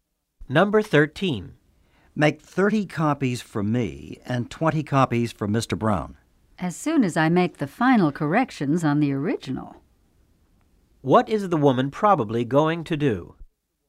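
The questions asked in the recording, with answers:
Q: What is the woman probably going to do?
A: Make the final corrections on the original before copying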